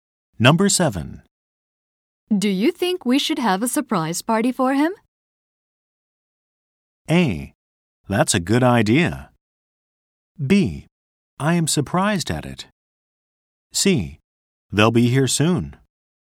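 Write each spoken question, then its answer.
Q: Do you think we should have a surprise party for him?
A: A: That's a good idea.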